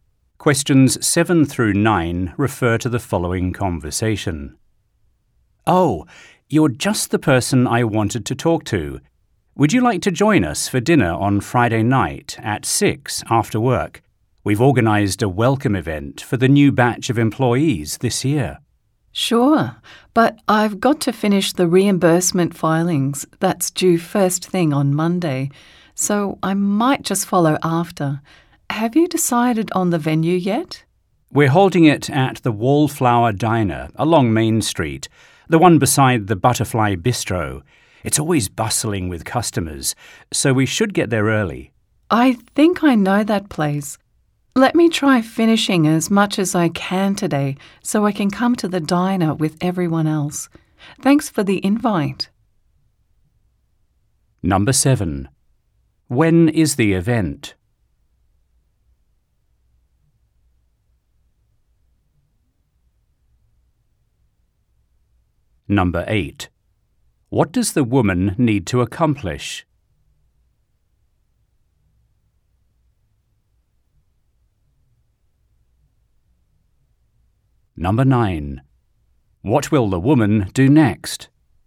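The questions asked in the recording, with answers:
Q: When is the event?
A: Friday night at 6, after work

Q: What does the woman need to accomplish?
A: Finish the reimbursement filings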